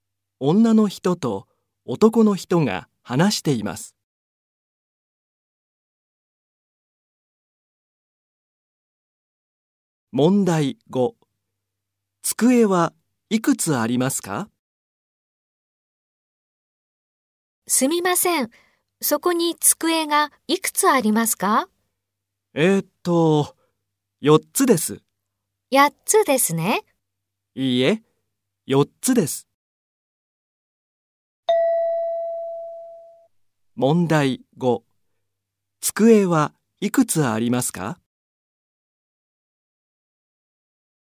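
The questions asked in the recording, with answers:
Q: 机はいくつありますか?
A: 4つ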